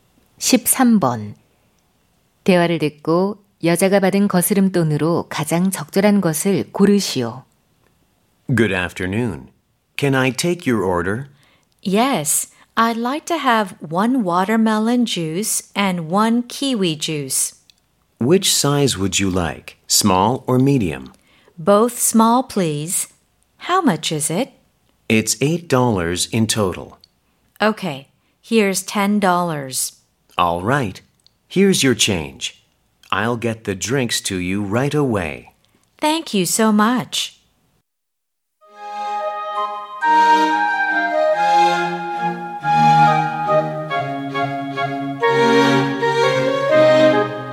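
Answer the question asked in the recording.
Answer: 2달러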